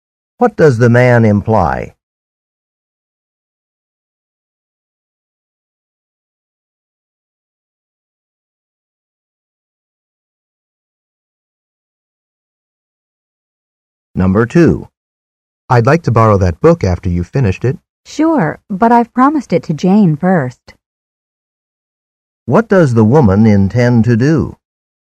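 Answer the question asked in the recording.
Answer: Lend the book to Jane first, then to the man.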